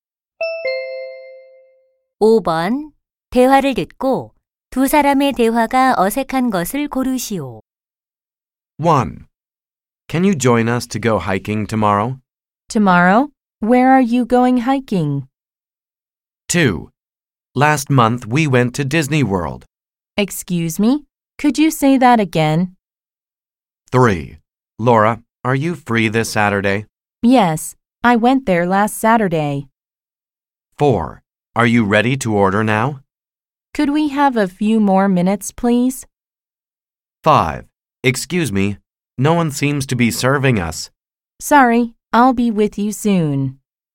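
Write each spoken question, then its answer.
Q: 대화를 듣고 두 사람의 대화가 어색한 것을 고르시오.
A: 3: Laura, are you free this Saturday? / Yes, I went there last Saturday.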